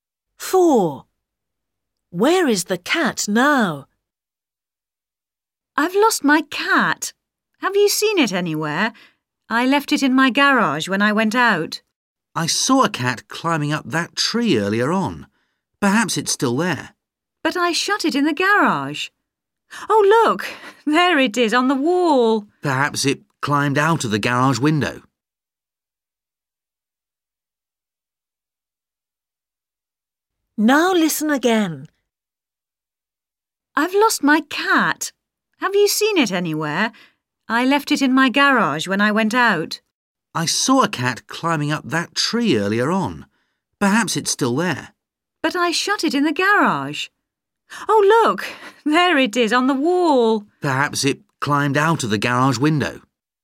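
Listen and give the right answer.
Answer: On the wall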